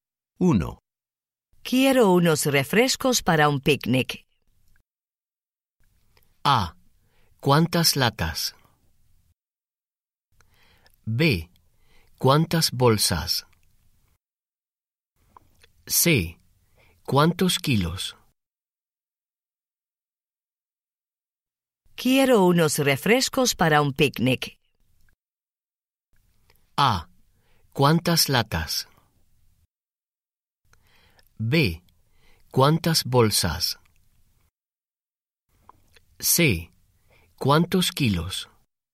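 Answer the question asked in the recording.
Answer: A: ¿Cuántas latas?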